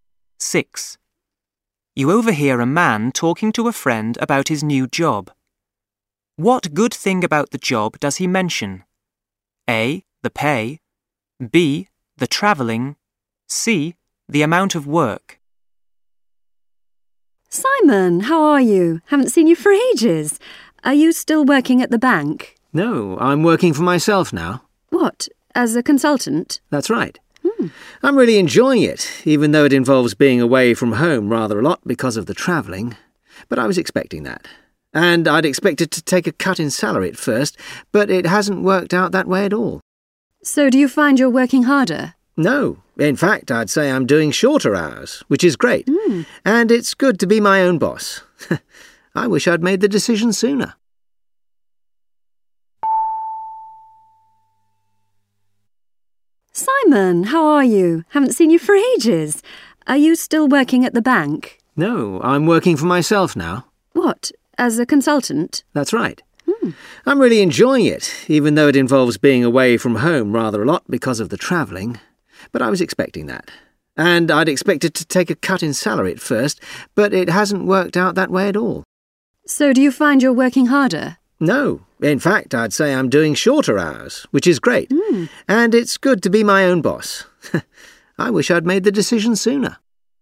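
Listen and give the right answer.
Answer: C: The amount of work.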